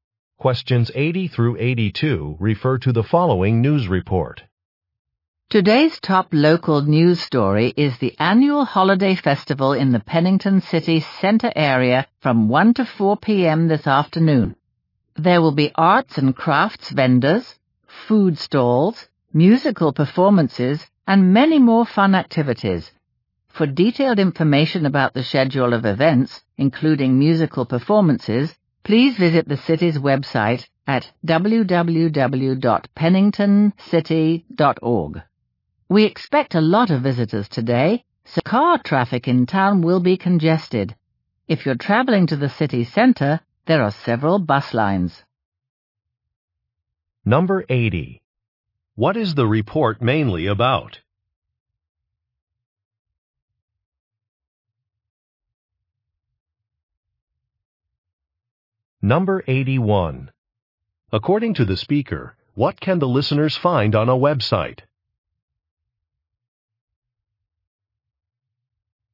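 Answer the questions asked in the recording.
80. An annual holiday festival
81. A schedule of events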